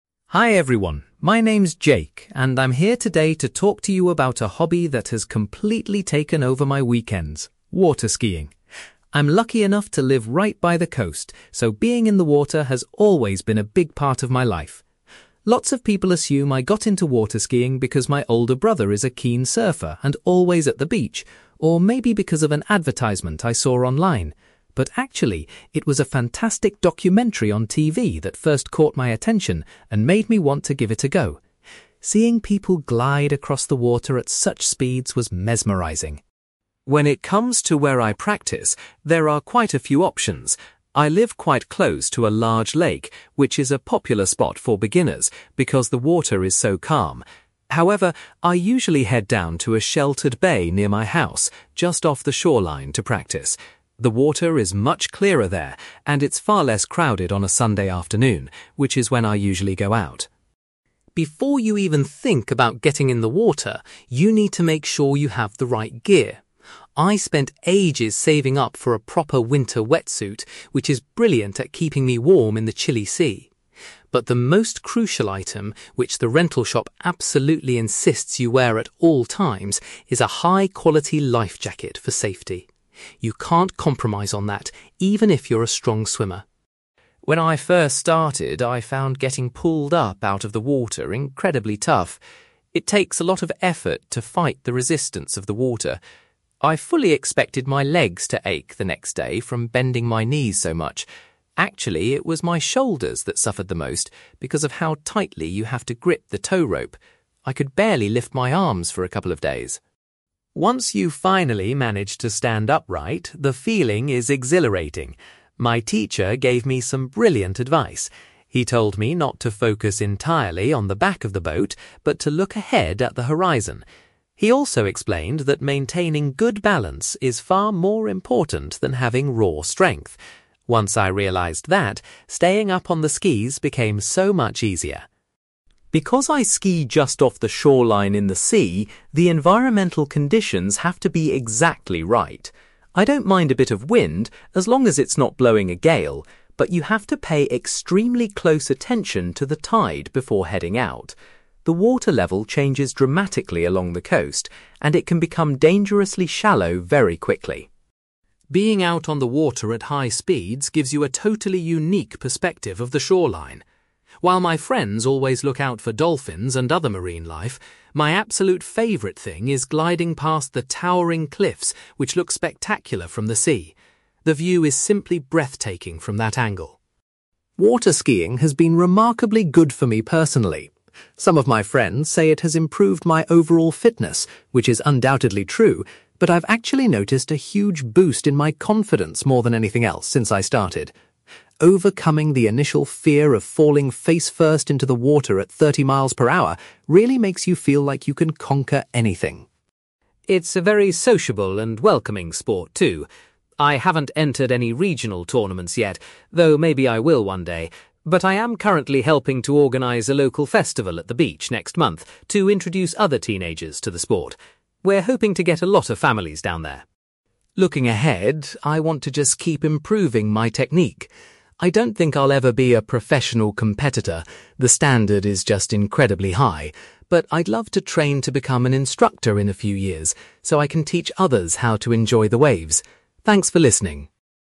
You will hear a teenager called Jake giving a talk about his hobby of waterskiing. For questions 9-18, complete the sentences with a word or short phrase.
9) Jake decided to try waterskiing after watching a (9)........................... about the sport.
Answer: documentary

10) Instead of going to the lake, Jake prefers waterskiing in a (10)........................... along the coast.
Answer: bay

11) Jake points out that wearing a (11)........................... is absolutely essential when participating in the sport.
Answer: life jacket

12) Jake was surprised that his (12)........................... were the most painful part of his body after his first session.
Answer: shoulders

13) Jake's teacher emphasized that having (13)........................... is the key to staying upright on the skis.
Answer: balance

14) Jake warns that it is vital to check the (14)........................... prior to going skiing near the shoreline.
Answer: tide

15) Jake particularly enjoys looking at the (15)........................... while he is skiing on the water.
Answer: cliffs

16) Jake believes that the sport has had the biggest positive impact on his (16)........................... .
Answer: confidence

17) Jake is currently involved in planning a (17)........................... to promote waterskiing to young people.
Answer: festival

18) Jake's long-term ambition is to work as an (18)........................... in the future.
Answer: instructor

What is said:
Jake: Hi everyone, my name's Jake, and I'm here today to talk to you about a hobby that has completely taken over my weekends: waterskiing. I'm lucky enough to live right by the coast, so being in the water has always been a big part of my life. Lots of people assume I got into waterskiing because my older brother is a keen surfer and always at the beach, or maybe because of an advertisement I saw online. But actually, it was a fantastic documentary on TV that first caught my attention and made me want to give it a go. Seeing people glide across the water at such speeds was mesmerizing.
When it comes to where I practice, there are quite a few options. I live quite close to a large lake, which is a popular spot for beginners because the water is so calm. However, I usually head down to a sheltered bay near my house, just off the shoreline, to practice. The water is much clearer there, and it's far less crowded on a Sunday afternoon, which is when I usually go out.
Before you even think about getting in the water, you need to make sure you have the right gear. I spent ages saving up for a proper winter wetsuit, which is brilliant at keeping me warm in the chilly sea. But the most crucial item, which the rental shop absolutely insists you wear at all times, is a high-quality life jacket for safety. You can't compromise on that, even if you're a strong swimmer.
When I first started, I found getting pulled up out of the water incredibly tough. It takes a lot of effort to fight the resistance of the water. I fully expected my legs to ache the next day from bending my knees so much. Actually, it was my shoulders that suffered the most because of how tightly you have to grip the tow rope! I could barely lift my arms for a couple of days.
Once you finally manage to stand upright, the feeling is exhilarating. My teacher gave me some brilliant advice. He told me not to focus entirely on the back of the boat, but to look ahead at the horizon. He also explained that maintaining good balance is far more important than having raw strength. Once I realized that, staying up on the skis became so much easier.
Because I ski just off the shoreline in the sea, the environmental conditions have to be exactly right. I don't mind a bit of wind, as long as it's not blowing a gale, but you have to pay extremely close attention to the tide before heading out. The water level changes dramatically along the coast, and it can become dangerously shallow very quickly.
Being out on the water at high speeds gives you a totally unique perspective of the shoreline. While my friends always look out for dolphins and other marine life, my absolute favourite thing is gliding past the towering cliffs which look spectacular from the sea. The view is simply breathtaking from that angle.
Waterskiing has been remarkably good for me personally. Some of my friends say it has improved my overall fitness, which is undoubtedly true, but I've actually noticed a huge boost in my confidence more than anything else since I started. Overcoming the initial fear of falling face-first into the water at thirty miles per hour really makes you feel like you can conquer anything.
It's a very sociable and welcoming sport too. I haven't entered any regional tournaments yet, though maybe I will one day, but I am currently helping to organise a local festival at the beach next month to introduce other teenagers to the sport. We're hoping to get a lot of families down there.
Looking ahead, I want to just keep improving my technique. I don't think I'll ever be a professional competitor, the standard is just incredibly high, but I'd love to train to become an instructor in a few years, so I can teach others how to enjoy the waves. Thanks for listening!

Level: B2